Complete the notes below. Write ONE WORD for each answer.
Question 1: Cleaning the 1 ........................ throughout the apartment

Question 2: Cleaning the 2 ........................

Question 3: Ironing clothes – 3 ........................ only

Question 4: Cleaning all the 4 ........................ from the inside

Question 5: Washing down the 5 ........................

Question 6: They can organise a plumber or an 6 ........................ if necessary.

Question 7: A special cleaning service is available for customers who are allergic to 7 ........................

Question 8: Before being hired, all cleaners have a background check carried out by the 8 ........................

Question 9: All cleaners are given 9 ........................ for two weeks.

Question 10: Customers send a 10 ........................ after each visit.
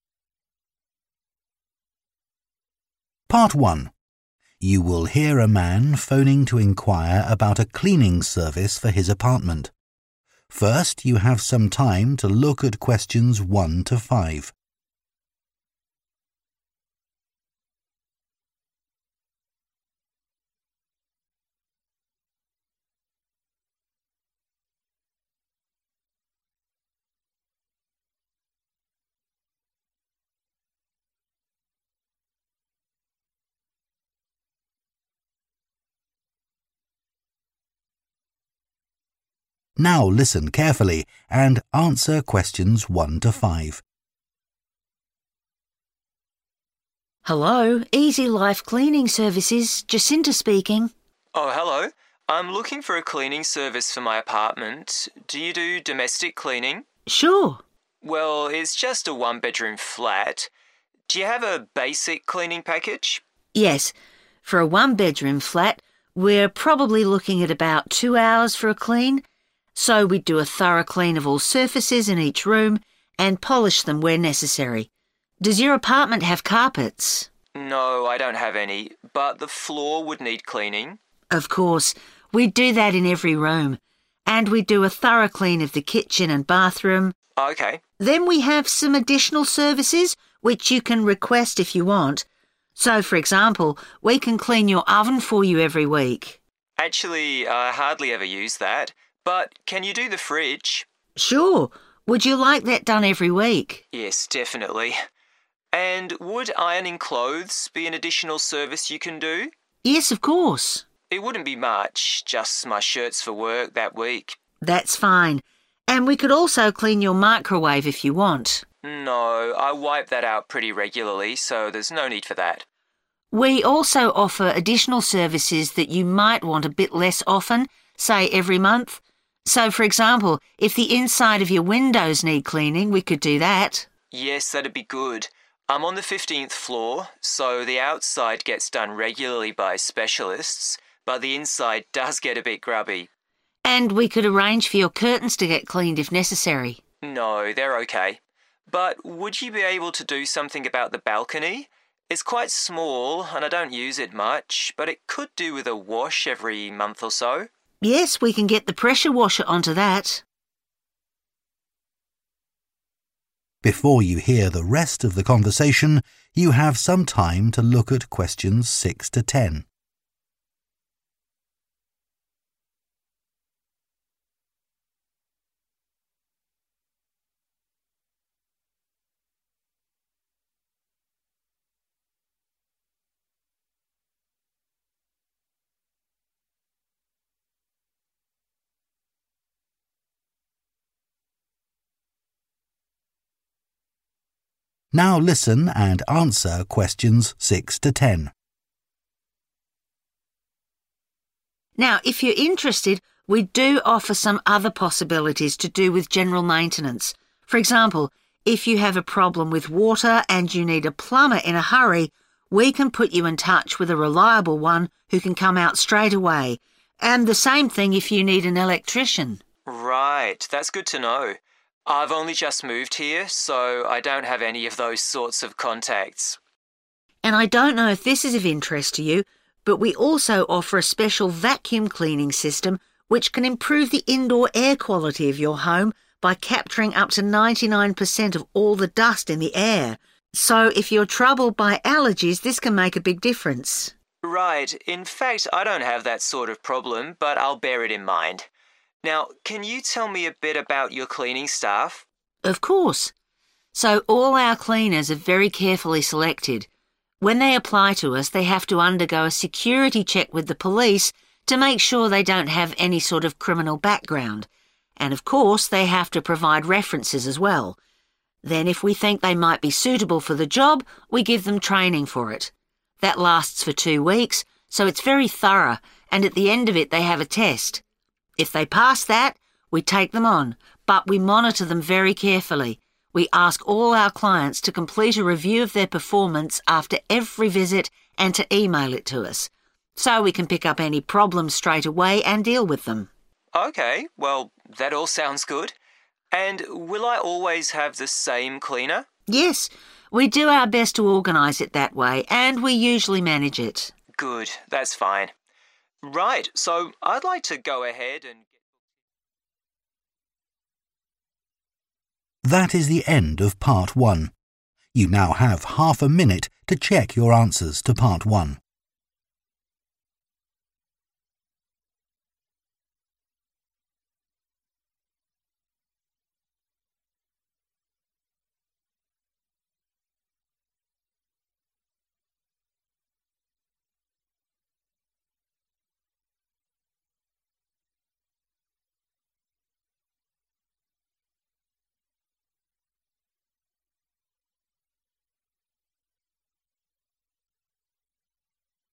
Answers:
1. Floor(s)
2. Fridge
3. Shirts
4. Windows
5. Balcony
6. Electrician
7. Dust
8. Police
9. Training
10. Review